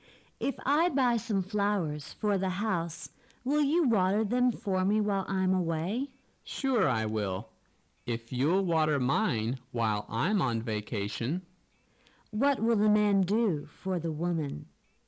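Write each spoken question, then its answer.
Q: What will the man do for the woman?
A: Water her flowers while she is away

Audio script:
[听力原文] W: If I buy some flowers for the house, will you water them for me while I'm way? M: Sure I will, if you'll water mine while I'm on vacation. Q: What will the man do for the woman?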